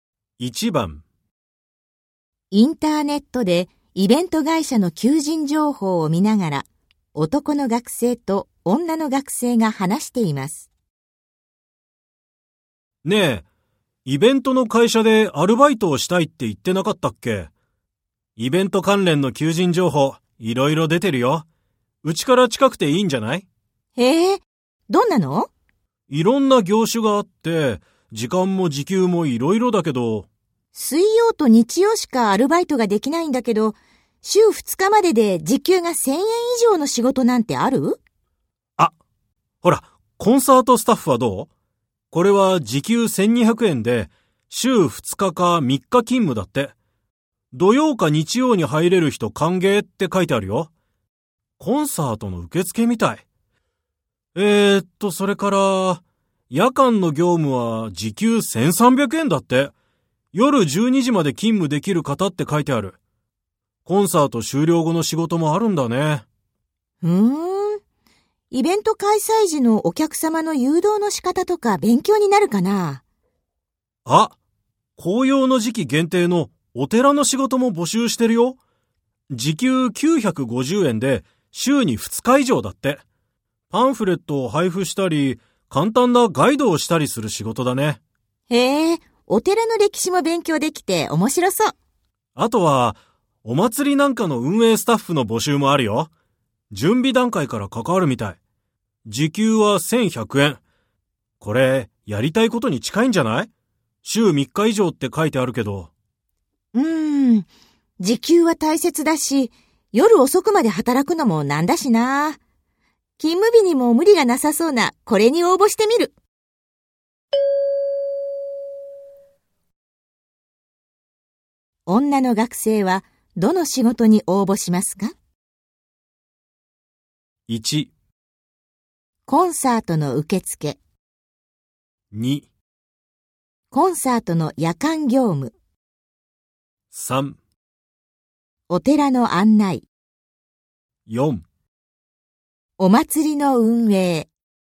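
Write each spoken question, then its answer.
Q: 女の学生は、どの仕事に応募しますか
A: 1: コンサートの受付。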